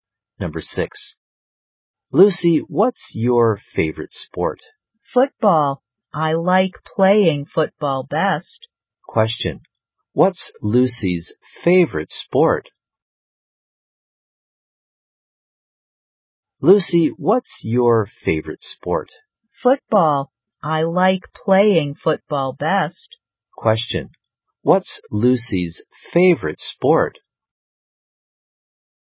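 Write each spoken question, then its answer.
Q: What's Lucy's favorite sport?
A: Football.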